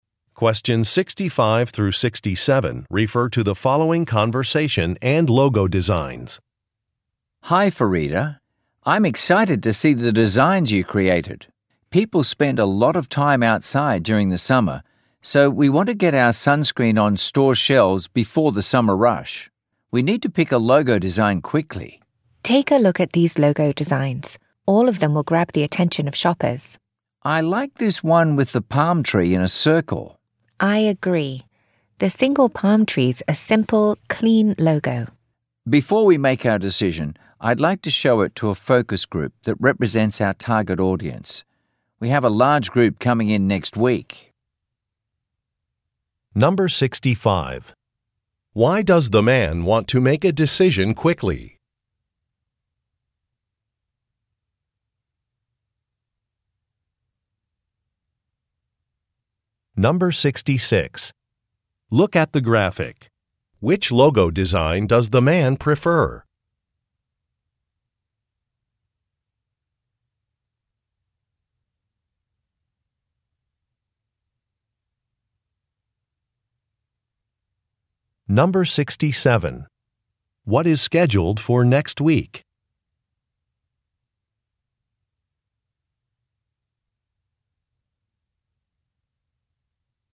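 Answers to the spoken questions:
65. To get the sunscreen on store shelves before the summer rush
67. A focus group session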